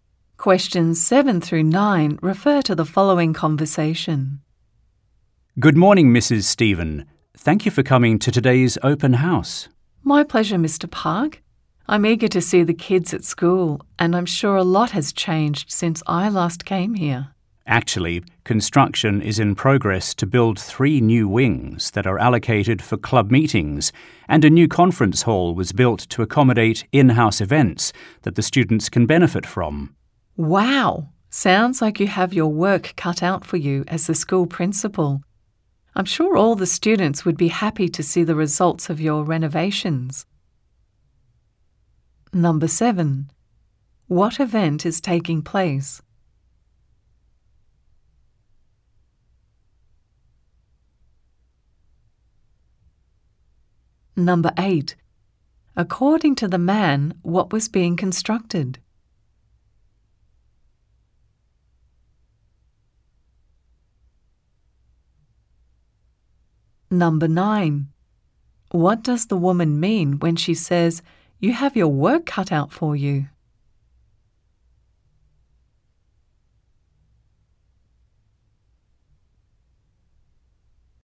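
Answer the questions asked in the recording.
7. A school open house
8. Three new wings for club meetings
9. The principal has a lot of hard work to do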